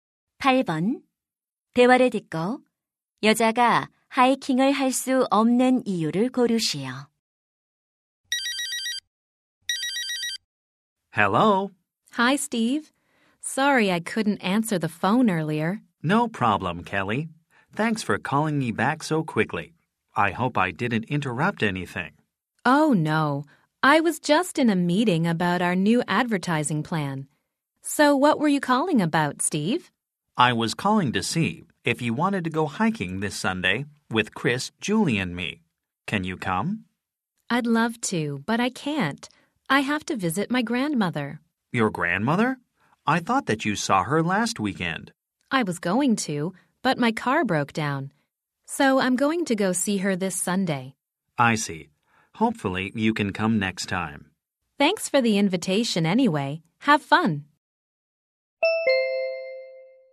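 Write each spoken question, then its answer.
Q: 대화를 듣고 여자가 하이킹을 할 수 없는 이유를 고르시오.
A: 할머니를 방문해야 해서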